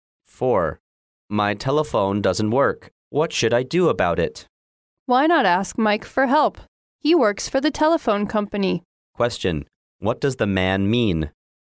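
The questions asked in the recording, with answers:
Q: What does the man mean?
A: She should ask Mike, who works for the telephone company, for help.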